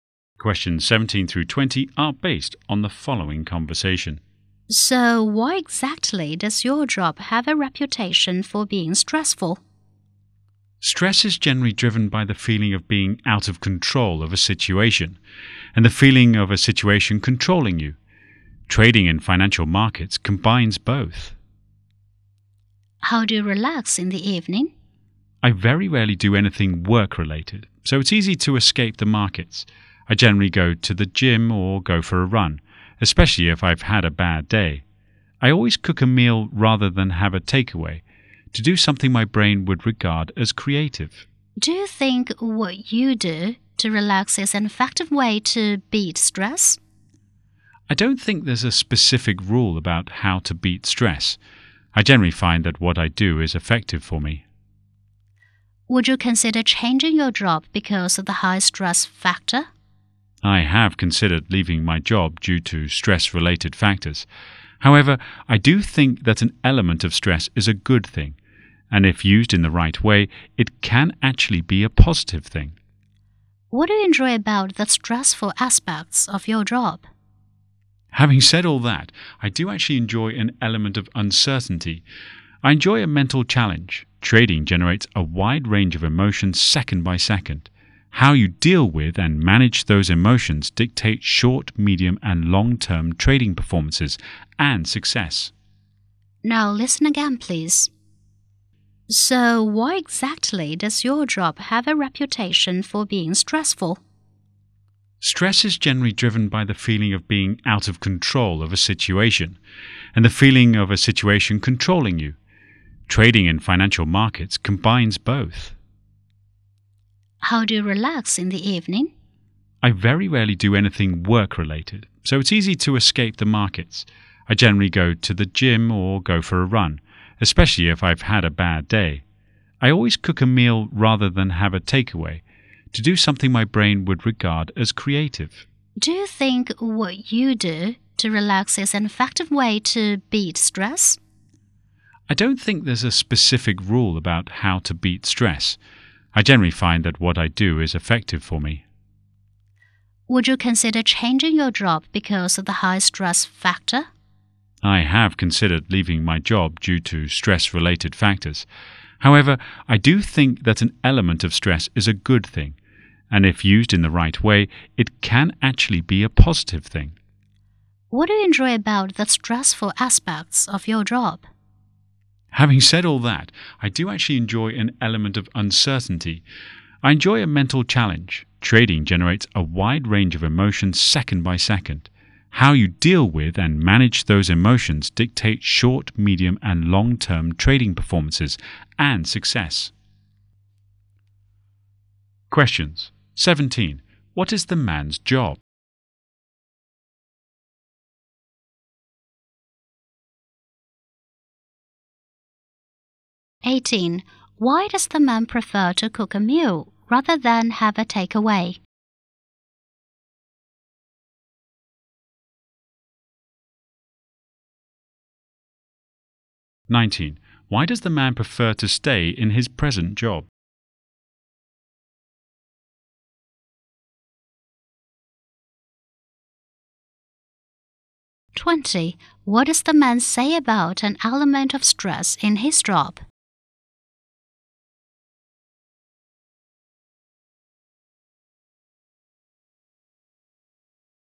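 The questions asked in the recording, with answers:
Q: What is the man's job?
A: A financial market trader

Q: Why does the man prefer to cook a meal rather than have a takeaway?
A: To do something creative

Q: Why does the man prefer to stay in his present job?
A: He enjoys uncertainty and mental challenge

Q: What does the man say about an element of stress in his job?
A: It can be a good, positive thing if used the right way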